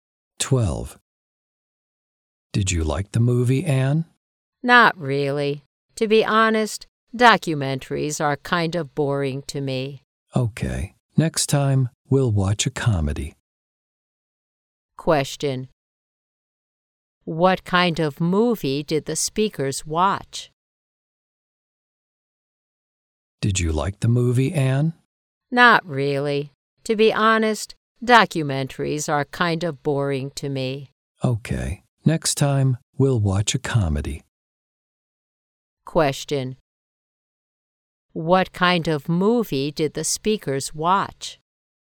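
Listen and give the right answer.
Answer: A documentary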